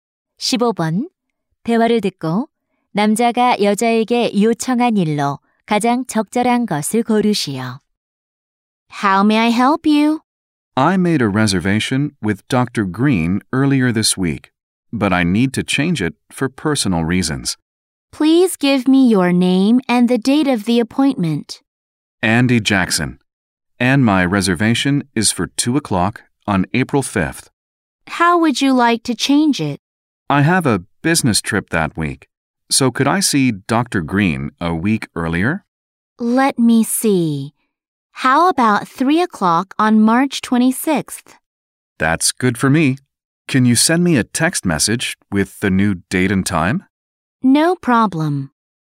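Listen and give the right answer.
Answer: 새 예약 날짜와 시간을 문자로 보내 주기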